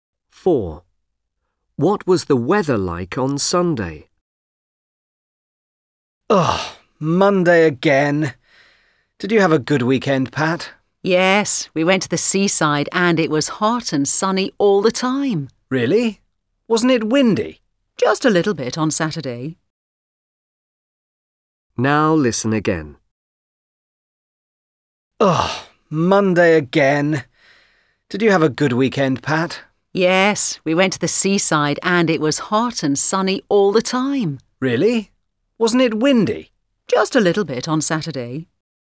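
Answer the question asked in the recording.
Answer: hot and sunny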